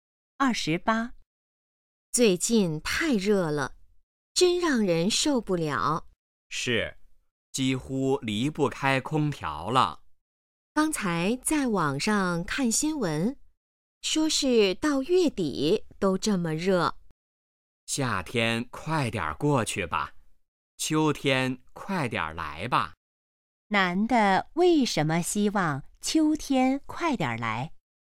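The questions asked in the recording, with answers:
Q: 男的为什么希望秋天快点来?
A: 夏天太热了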